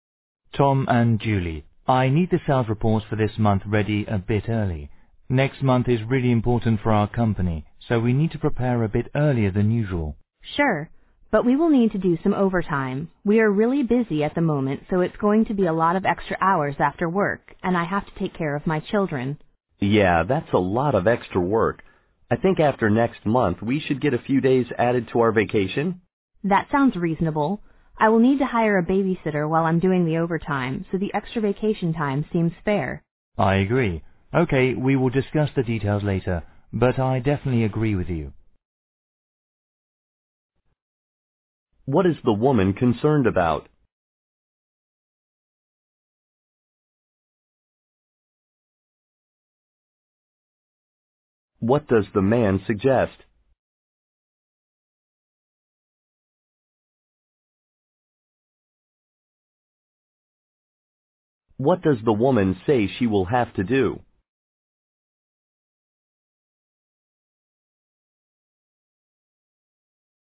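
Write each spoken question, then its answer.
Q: What does the man suggest?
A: Adding a few days to their vacation after next month

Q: What does the woman say she will have to do?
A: Hire a babysitter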